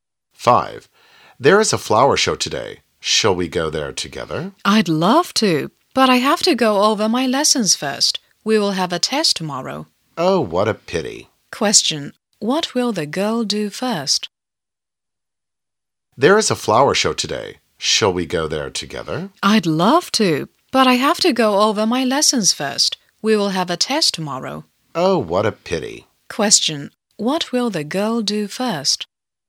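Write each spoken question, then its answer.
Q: What will the girl do first?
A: Go over her lessons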